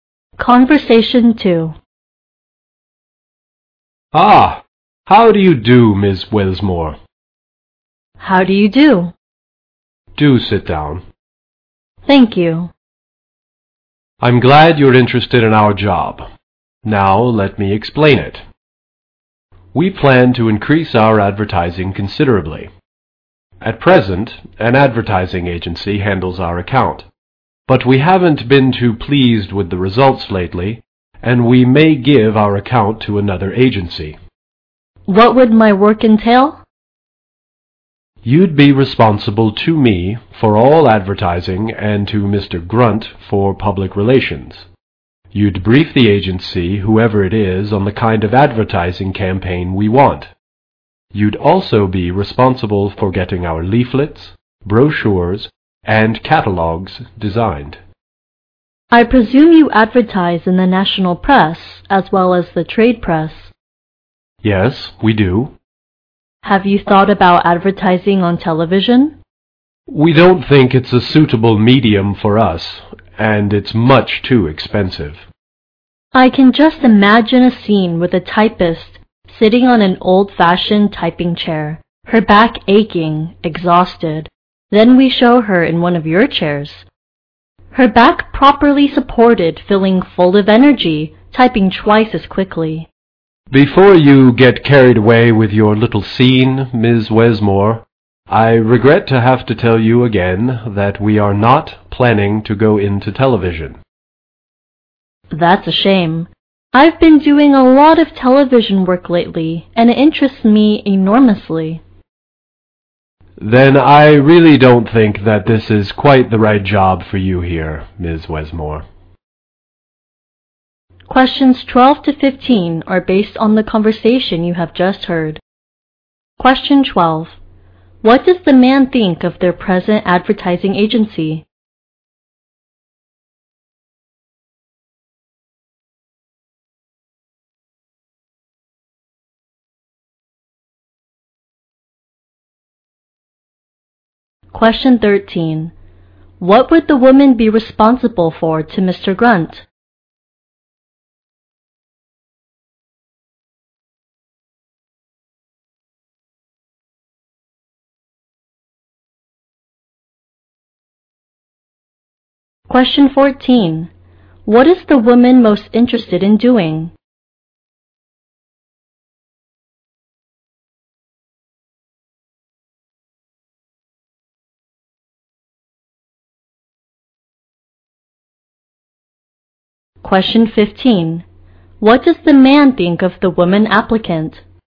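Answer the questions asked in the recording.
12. They are not pleased with its recent results.
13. Public relations.
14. Television advertising work.
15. She is not right for the job.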